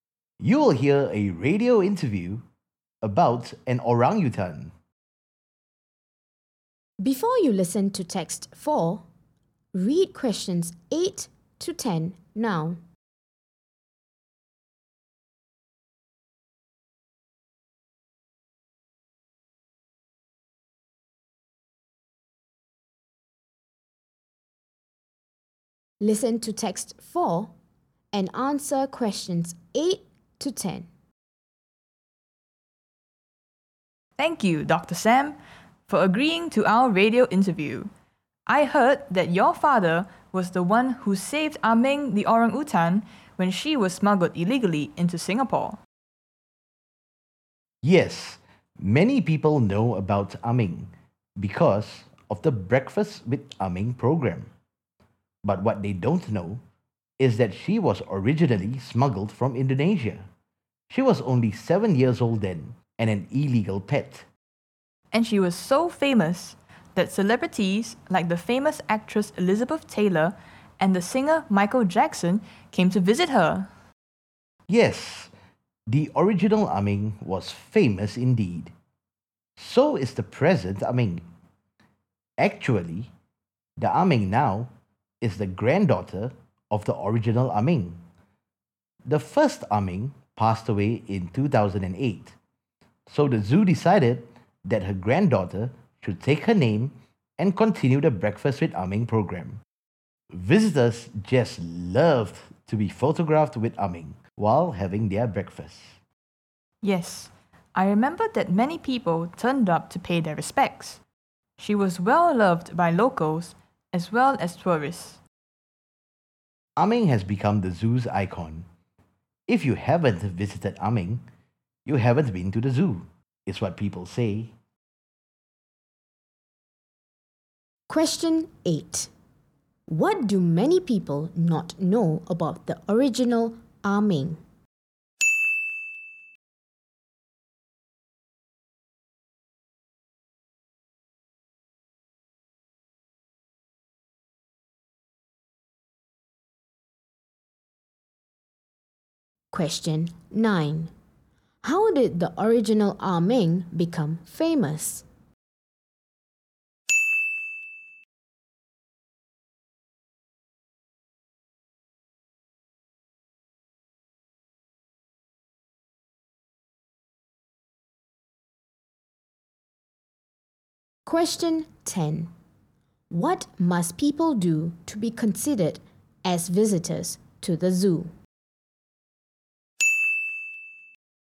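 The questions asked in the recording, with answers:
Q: What do many people not know about the original Ah Meng?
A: She was originally smuggled from Indonesia.

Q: What must people do to be considered as visitors to the zoo?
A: Visit Ah Meng.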